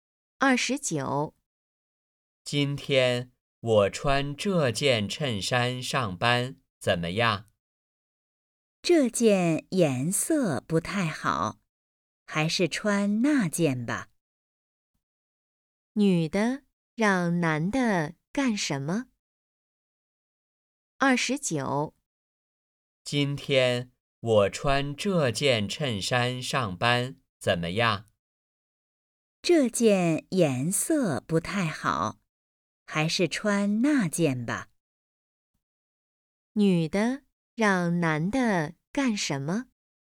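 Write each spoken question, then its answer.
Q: 女的让男的干什么?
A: 穿那件衬衫(换一件)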